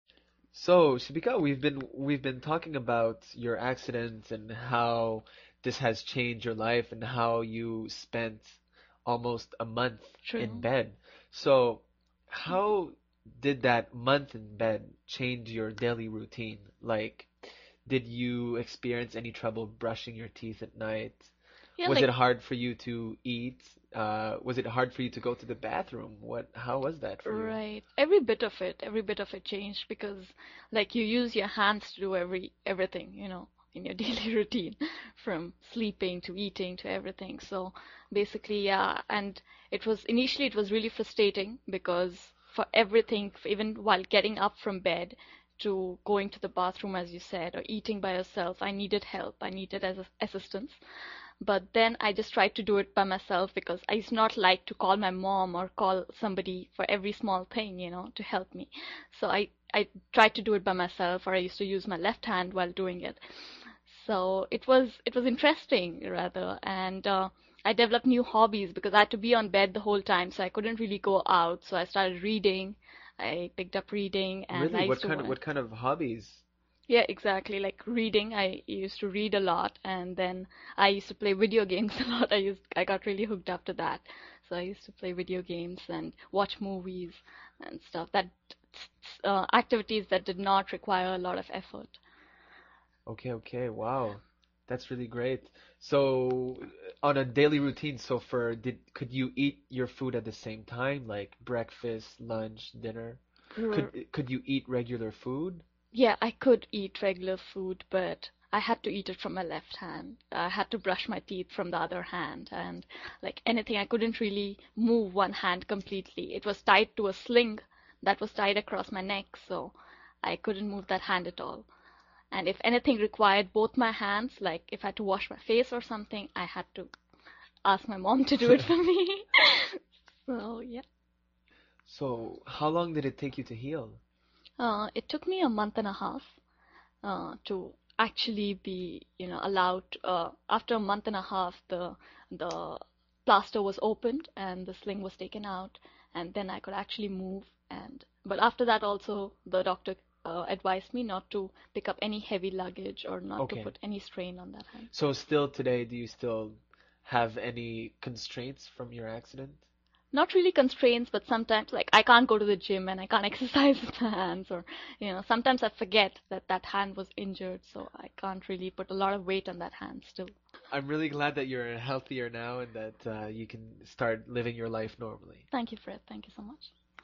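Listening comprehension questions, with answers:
用 1-2 句话用自己的话回答下面的问题。点「✨ AI 判断」后,AI 会对照当天 transcript 给出参考要点与评分。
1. How long did Shibika have to stay in bed after her accident, and what did the doctor advise her to do after the plaster was opened and the sling was taken out?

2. What specific daily tasks did Shibika say she had to do with her left hand, and what task required her to ask her mom for help because it needed both hands?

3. What new hobbies did Shibika develop during her time in bed, and what kind of activities did she specifically choose to do?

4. What is one current limitation Shibika still has today as a result of her accident, even after healing?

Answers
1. Almost a month; not to pick up heavy luggage or put any strain on the hand.
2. Eating and brushing her teeth; washing her face.
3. Reading, playing video games and watching movies; activities that did not require a lot of effort.
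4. She can't exercise with her hands at the gym or put a lot of weight on that hand.

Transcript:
Fred
So, Shibika, we've been talking about your accident and how this has changed your life and how you spent almost a month in bed, so how did that month in bed change your daily routine, like, did you experience any trouble brushing your teeth at night?
FredSo, Shibika, we've been talking about your accident and how this has changed your life and how you spent almost a month in bed, so how did that month in bed change your daily routine, like, did you experience any trouble brushing your teeth at night? Was it hard for you to eat? Was it hard for you to go to the bathroom? What? How was that?
Every bit of it . Every bit of it changed because, like you use your hands to do everthing, you know, in your daily routine, from sleeping to eating to everything, so basically, yeah, and it was initially it was really frustrating because for everything, even while getting up from bed, to going to the bathroom as you said, or eating by yourself, I needed help. 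I needed assistance.
But then I just tried to do it by myself because it's not like to call my mom, or call somebody for every small pain you know, to help me, so I tried to do it by myself or I used to use my left hand while doing it, so it was interesting, rather and I developed new hobbies because I had to be in bed the whole time so I couldn't really go out so I started dreading. I picked up reading.
FredReally, what kind of hobbies?
ShibikaYeah, exactly, like reading. I used to read a lot and then I used to play video games a lot. I got really hooked after that, so I used to play video games and watch movies and stuff. Activities that did not require a lot of effort .
FredSo, on a daily routine, so for, could you eat your food at the same time, like breakfast, lunch, dinner? Could you eat regular food?
I could eat regular food , but I had to eat it from my left hand. I had to brush my teeth from the other hand, and like anything, I couldn't really move one hand completely. 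It was tied to a sling that was tied across my neck so, I couldn't move that hand at all, and if anything required both my hands, like if I had to wash my face or something I had to ask my mom to do it for me.
FredSo how long did it take you to heal?
ShibikaIt took me a month and a half to actually be you know allowed... after a month and a half the plaster was opened and the sling was taken out and then I could actually move the hand. But after that, also the doctor advised me not to pick up any heavy luggage or not to put any strain on the hand.
FredSo, still today do you still have any constraints from your accident?
ShibikaNot really constraints, but sometimes, like I can not go to the gym and I can't exercise the hands, or sometimes I forget that that hand was injured so I can't really put a lot of weight on that hand still.
FredI'm really glad that you're healthier now and that you can start living your life normally.
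ShibikaThank you, Fred. Thank you, so much. <div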